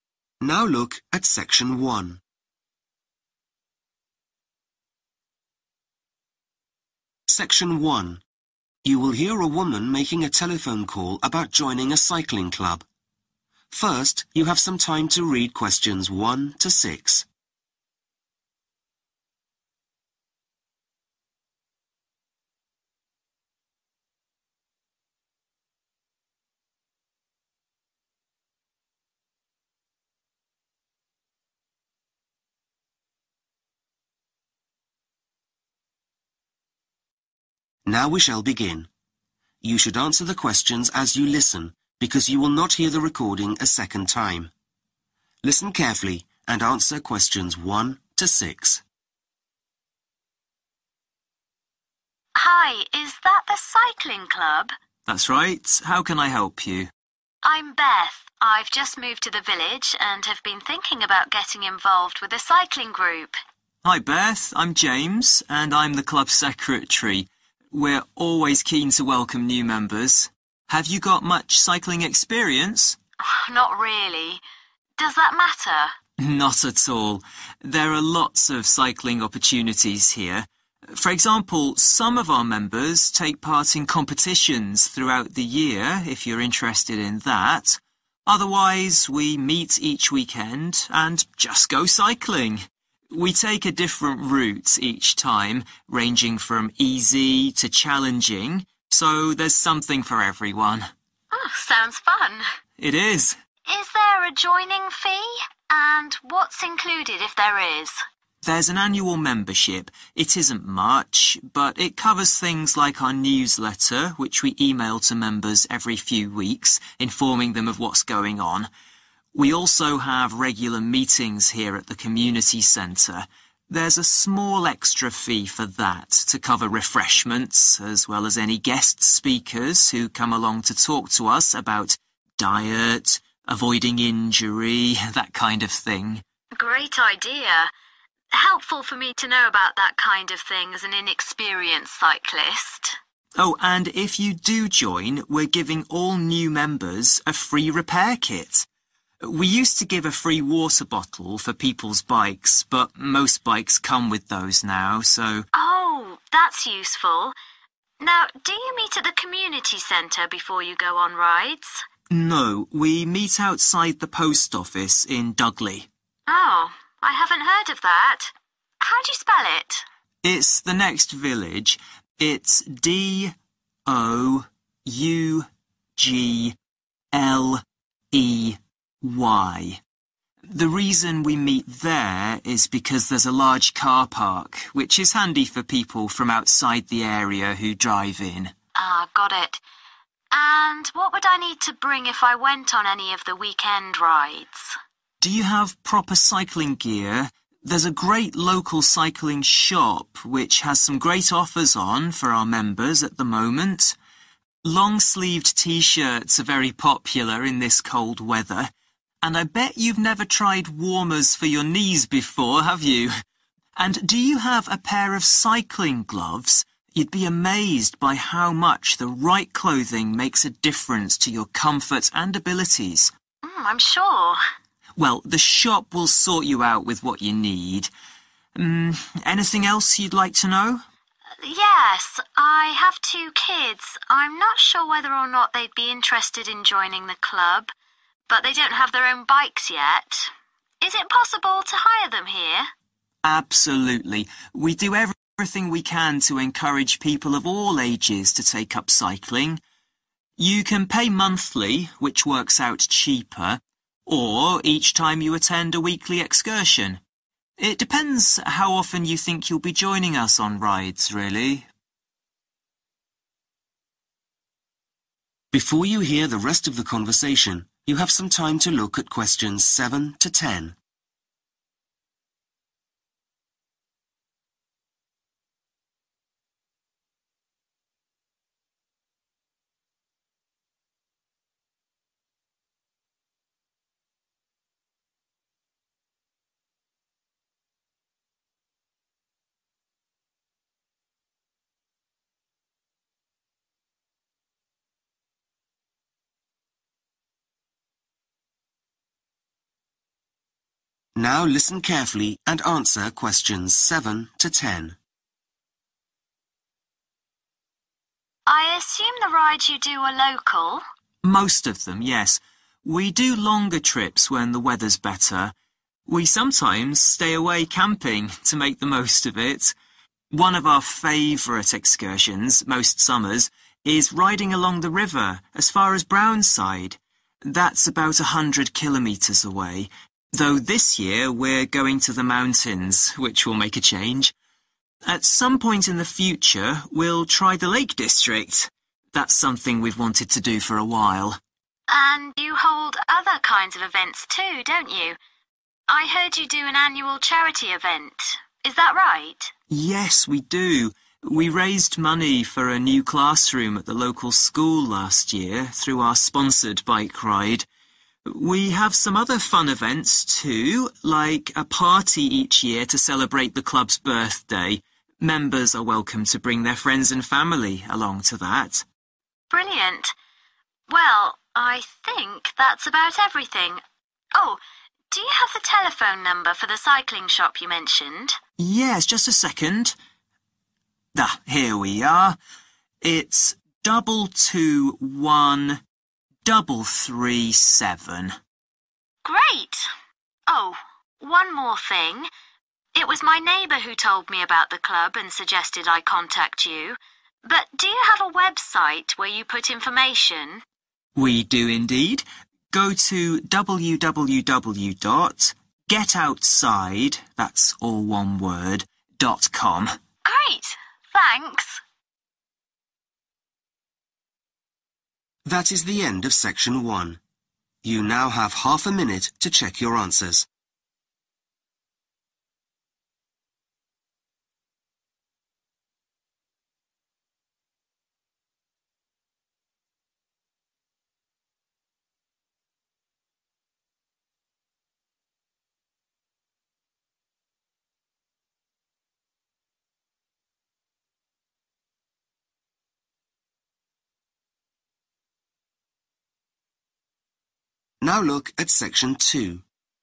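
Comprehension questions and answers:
Complete the notes below. Write NO MORE THAN TWO WORDS AND/ OR A NUMBER for each answer.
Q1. Chance for members to enter (1)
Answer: competitions

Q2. Extra fee covers meetings with guest speakers and (2)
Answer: refreshments

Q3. New members receive a free (3) for their bike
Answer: repair kit

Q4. Club meets in the village of (4)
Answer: Dougle

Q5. Tops with long sleeves and warmers for (5) available at a discount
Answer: knees

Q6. Payment for bike hire is on a (6) basis or per outing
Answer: monthly

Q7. This summer's camping trip will be to the (7)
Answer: mountains

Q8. Club runs a yearly (8) event for the local community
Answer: charity

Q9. Cycling shop telephone number – (9)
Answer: 221337

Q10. Name of website – www. (10) .com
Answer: getoutside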